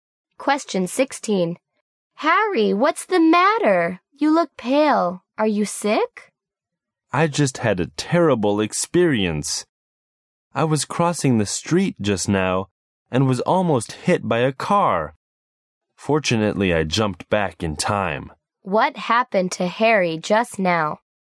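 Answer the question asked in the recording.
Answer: A car nearly hit him as he crossed the street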